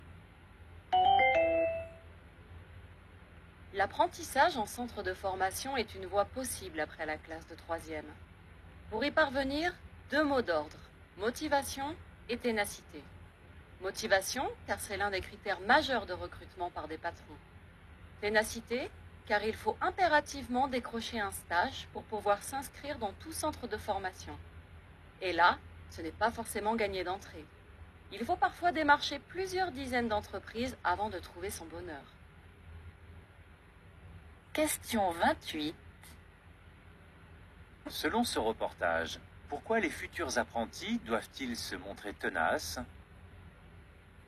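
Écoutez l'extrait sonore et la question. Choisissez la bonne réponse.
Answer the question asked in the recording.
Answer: Car il faut impérativement trouver un stage pour s'inscrire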